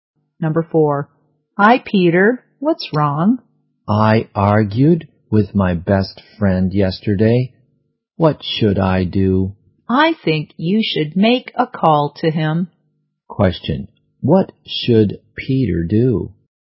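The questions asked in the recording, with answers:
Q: What should Peter do?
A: Call his best friend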